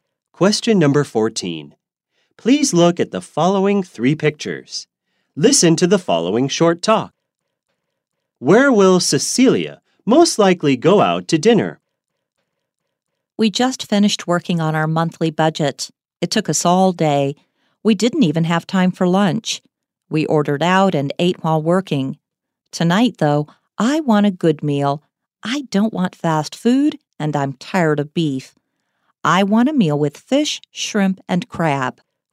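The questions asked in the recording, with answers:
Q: Where will Cecilia?Most likely go out to dinner.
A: A seafood restaurant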